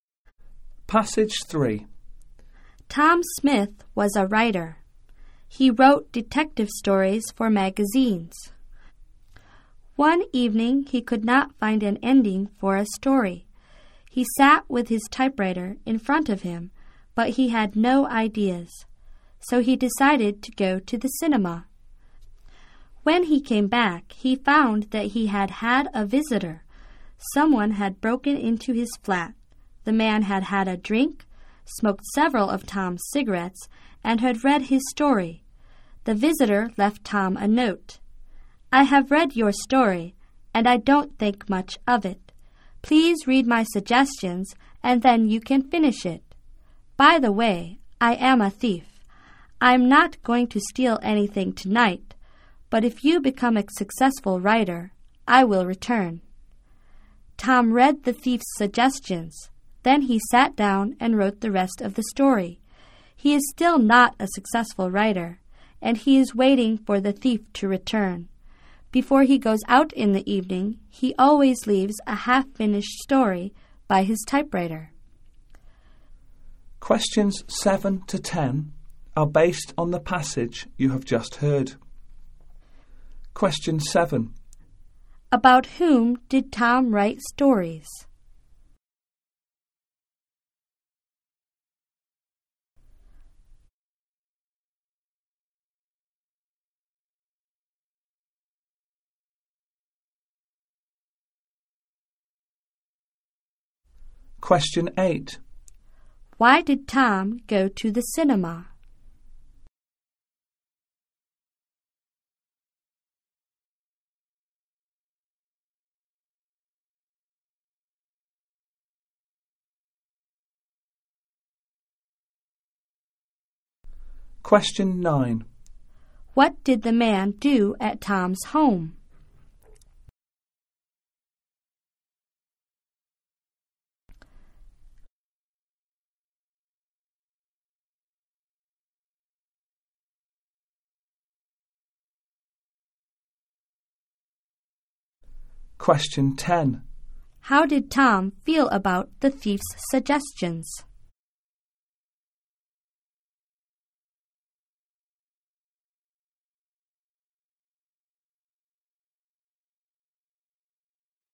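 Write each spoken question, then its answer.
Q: About whom did Tom write stories?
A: Detectives.

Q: Why did Tom go to the cinema?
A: He could not find an ending for his story.

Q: What did the man do at Tom's home?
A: He had a drink, smoked Tom's cigarettes and read his story.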